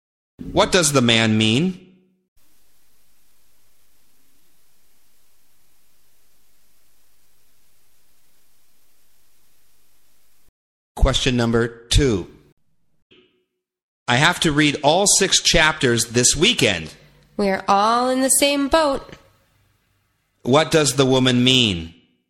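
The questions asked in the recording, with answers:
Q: What does the woman mean?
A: She has the same problem; she also has a lot to read.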